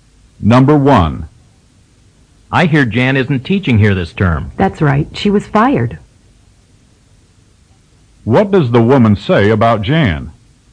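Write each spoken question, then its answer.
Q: What does the woman say about Jan?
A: She was fired.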